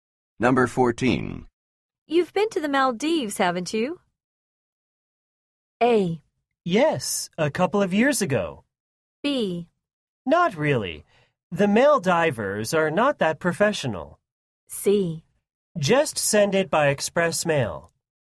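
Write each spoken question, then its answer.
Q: You've been to the Maldives, haven't you?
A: A: Yes, a couple of years ago.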